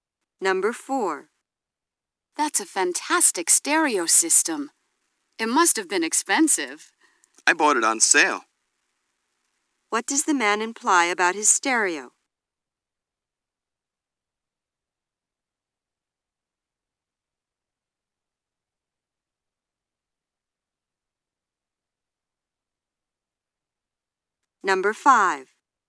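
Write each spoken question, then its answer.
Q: What does the man imply about his stereo?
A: It wasn't as expensive as it looks.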